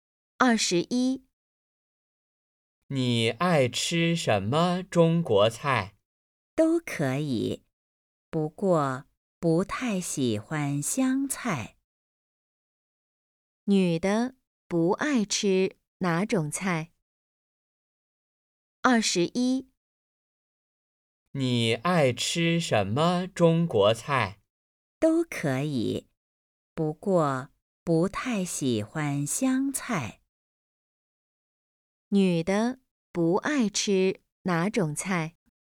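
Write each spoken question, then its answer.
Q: 女的不爱吃哪种菜?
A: 湘菜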